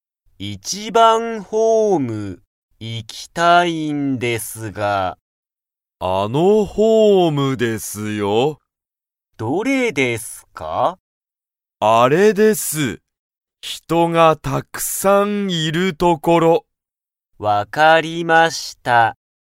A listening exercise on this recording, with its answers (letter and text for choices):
一番(いちばん)ホームには、人(ひと)がたくさんいますか?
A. はい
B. いいえ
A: A. はい

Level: Level 1